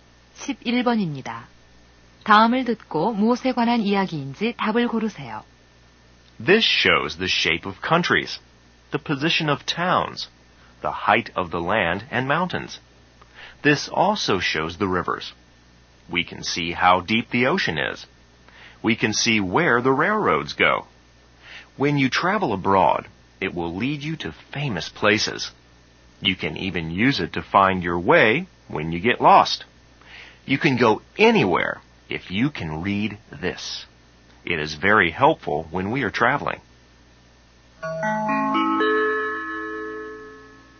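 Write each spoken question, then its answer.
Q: 다음을 듣고 무엇에 관한 이야기인지 답을 고르세요.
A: 지도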